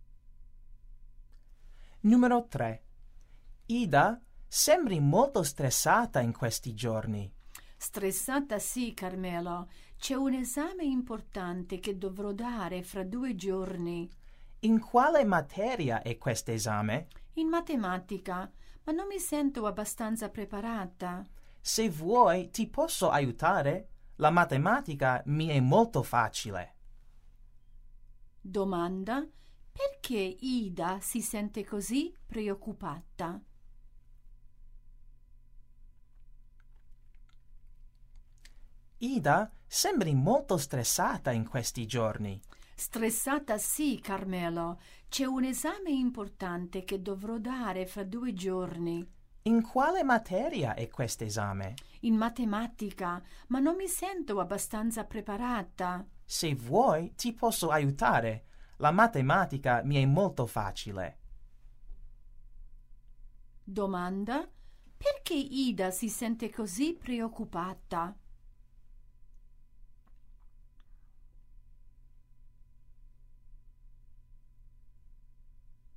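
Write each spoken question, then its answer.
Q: perché Ida si sente così preoccupata?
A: Ha un esame di matematica fra 2 giorni e non si sente preparata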